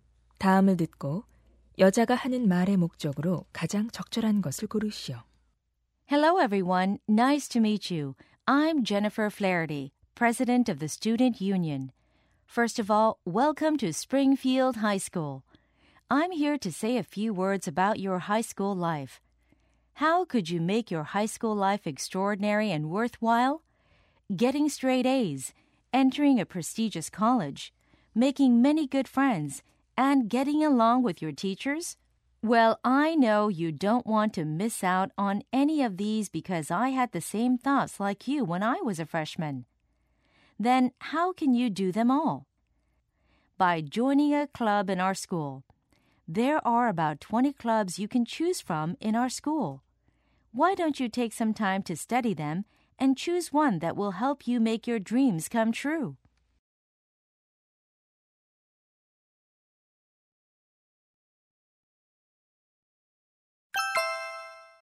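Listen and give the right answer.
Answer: 신입생들에게 학교 동아리 가입을 권장하려고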